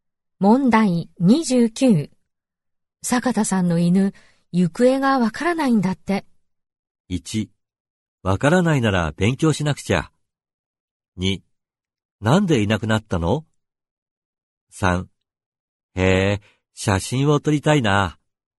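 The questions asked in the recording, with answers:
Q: 坂田さんの犬、行方がわからないんだって。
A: 2: なんでいなくなったの?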